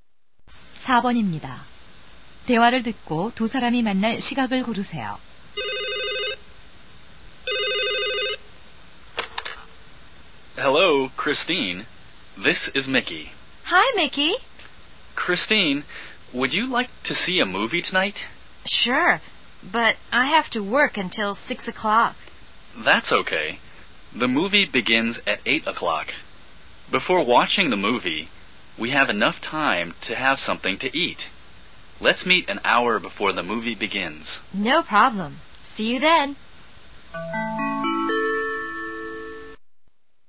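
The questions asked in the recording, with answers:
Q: 대화를 듣고 두 사람이 만날 시각을 고르세요.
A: 7시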